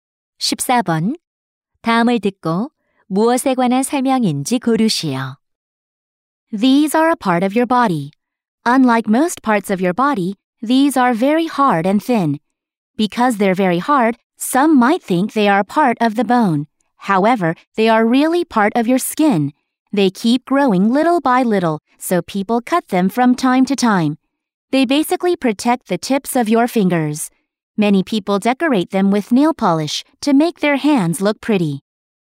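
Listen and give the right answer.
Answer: 손톱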